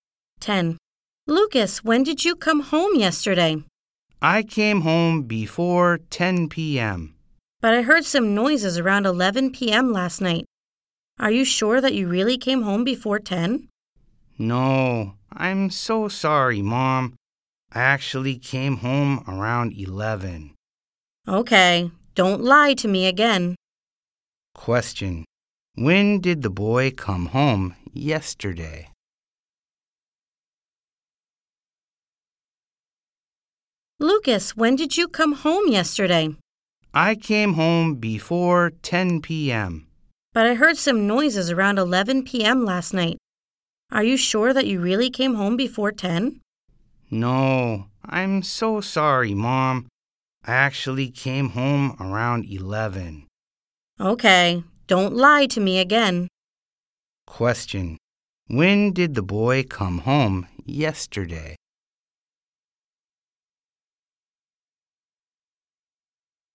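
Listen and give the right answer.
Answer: Around 11 p.m.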